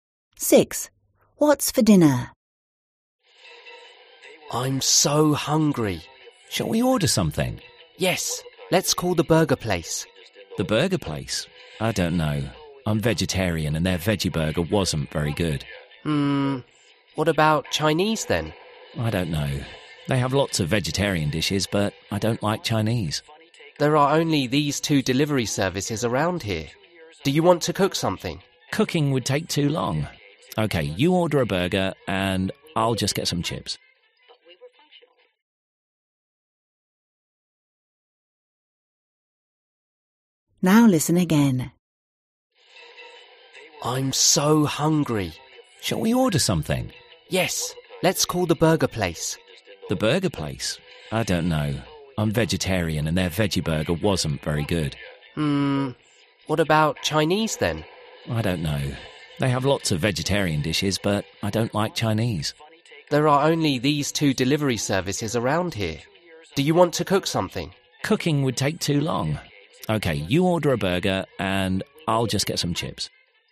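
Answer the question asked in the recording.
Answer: A burger and chips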